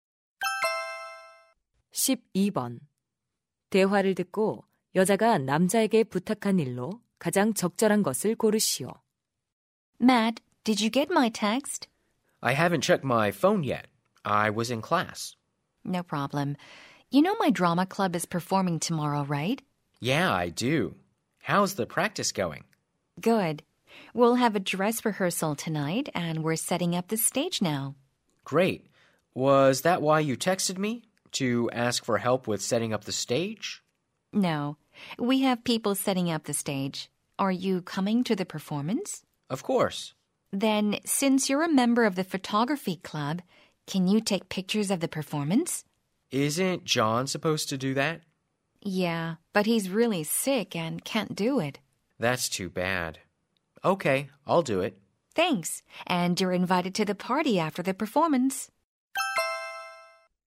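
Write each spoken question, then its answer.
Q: 대화를 듣고 여자가 남자에게 부탁한 일로 가장 적절한 것을 고르시오.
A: 공연 사진 촬영하기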